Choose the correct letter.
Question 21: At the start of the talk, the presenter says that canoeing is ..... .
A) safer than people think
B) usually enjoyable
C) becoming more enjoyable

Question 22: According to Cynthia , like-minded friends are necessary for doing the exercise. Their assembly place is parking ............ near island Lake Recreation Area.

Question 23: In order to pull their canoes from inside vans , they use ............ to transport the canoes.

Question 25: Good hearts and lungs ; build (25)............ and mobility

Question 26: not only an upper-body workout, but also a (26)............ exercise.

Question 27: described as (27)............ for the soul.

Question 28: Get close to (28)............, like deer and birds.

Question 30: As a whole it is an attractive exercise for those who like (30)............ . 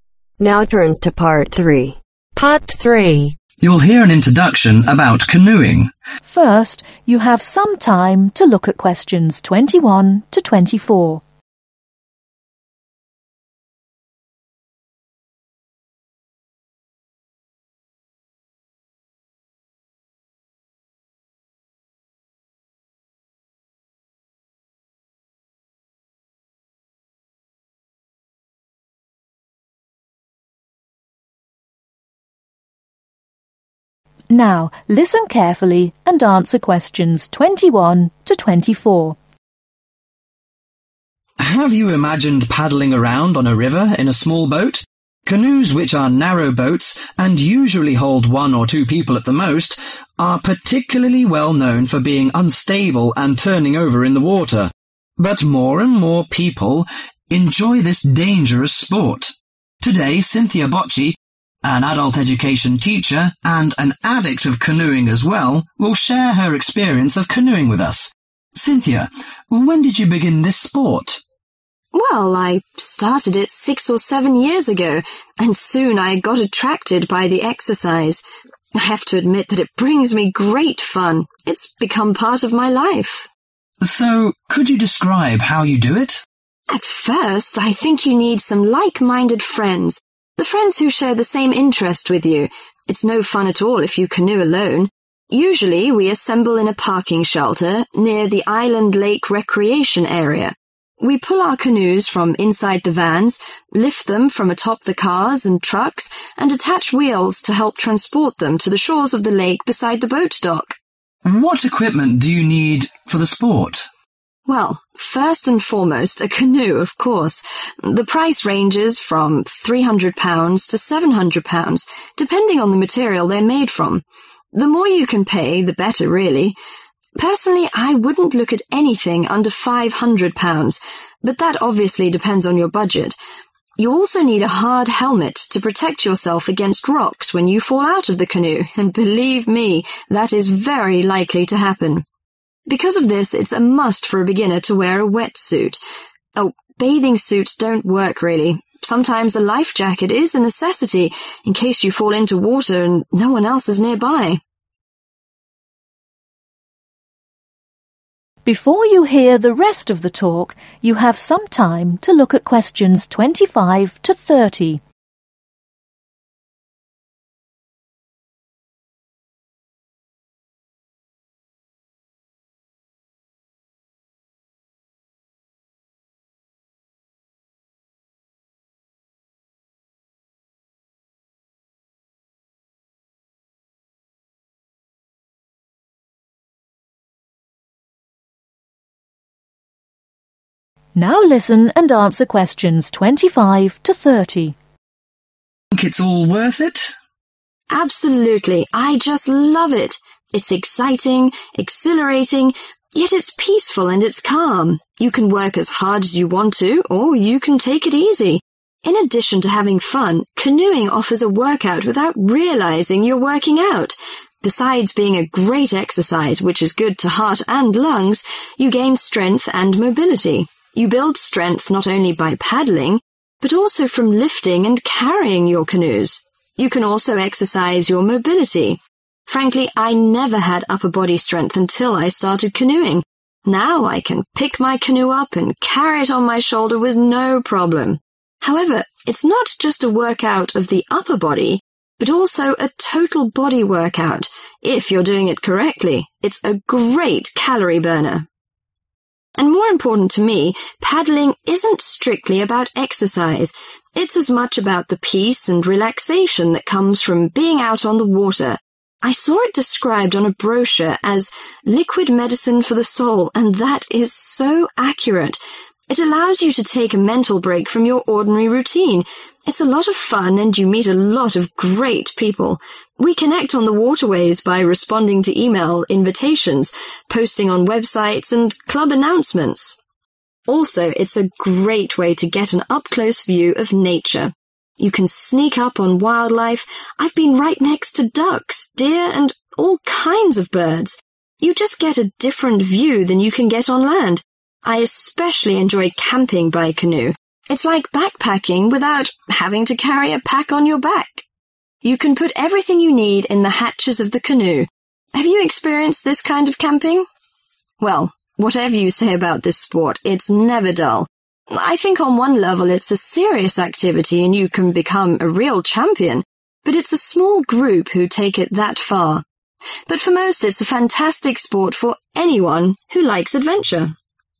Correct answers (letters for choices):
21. C
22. Shelter
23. Wheels
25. Strength
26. Total body
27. Liquid medicine
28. wildlife
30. Adventure